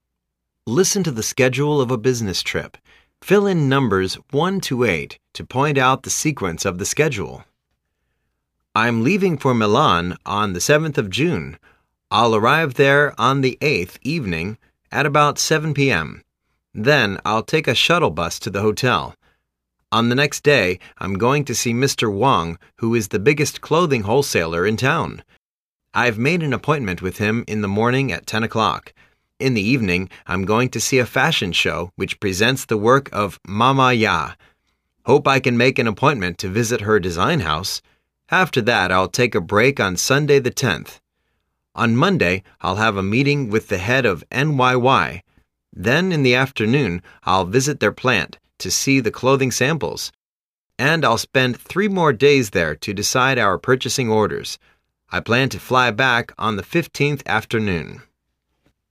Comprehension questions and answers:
Listen to the schedule of a business trip.Fill in numbers 1-8 to point out the sequence of the schedule.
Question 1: flying back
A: 8

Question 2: arrive hotel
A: 2

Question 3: visit NYY's plant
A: 6

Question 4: see the fashion show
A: 4

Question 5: meet the wholesaler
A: 3

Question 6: meeting in NYY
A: 5

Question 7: to Milan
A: 1

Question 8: decide the orders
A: 7

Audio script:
Listen to the schedule of a business trip. Fill in numbers l-8 to point out the sequence of the schedule.
I'm leaving for Milan on the 7th of June. l'II arrive there on the 8th evening at about 7:OOpm. Then, l'II take a shuttle bus to the hotel. On the next day, l'm going to see Mr.Wang who is the biggest clothing wholesaler in town. l've made an appointment with him in the morning at 10:00. In the evening, l'm going to see a fashion show which presents the works of Ma-Ma Yah. Hope I can make an appointment to visit her design house. After that, l'II take a break on Sunday, the lOth. On Monday, l'II have a meeting with the head of NYY. Then, in the afternoon, l'II visit their plant to see the clothing samples. And, l'II spend 3 more days there to decide our purchasing orders. I plan to fly back on the 15th afternoon.